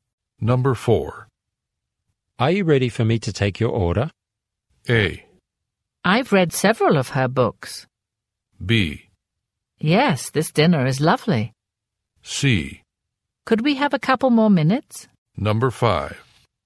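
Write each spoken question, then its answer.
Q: Are you ready for me to take your order?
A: C: Could we have a couple more minutes?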